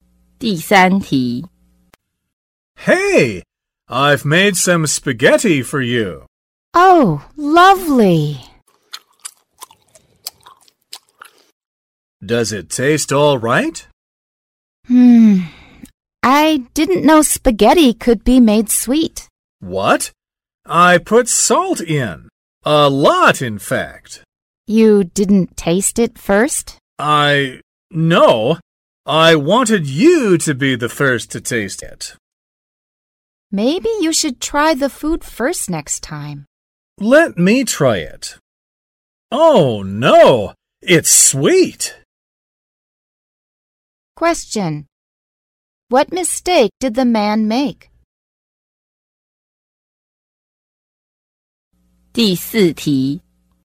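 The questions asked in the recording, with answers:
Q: What mistake did the man make?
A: He put sugar in instead of salt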